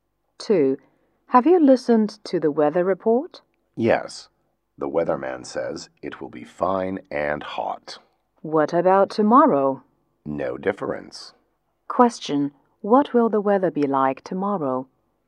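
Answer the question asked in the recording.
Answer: Fine and hot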